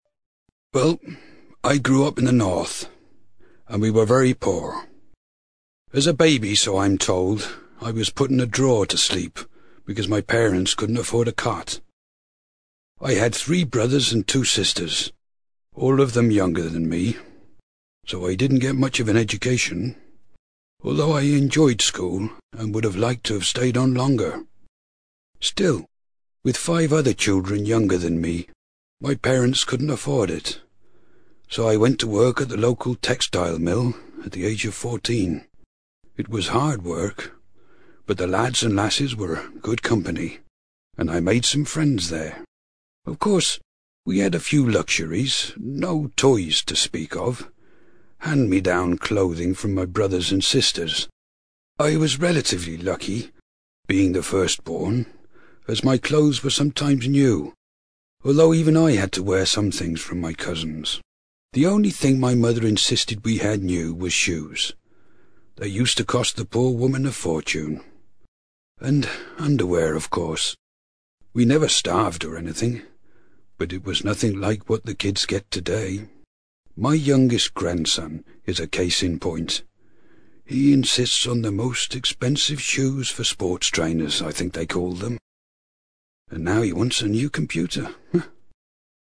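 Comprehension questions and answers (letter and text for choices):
You are going to hear an old man reminiscing about his childhood. For questions 5-6, choose the answer (A, B or C) which fits best according to what you hear.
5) The man went to work at the age of fourteen because...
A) he was the oldest child.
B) he had to keep five other children.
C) his family needed the extra income.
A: C) his family needed the extra income.

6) From what he says about his grandson, the man probably thinks that youngsters today...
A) shouldn't have computers.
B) wear only expensive footwear.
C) are spoiled.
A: C) are spoiled.

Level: CPE Proficiency English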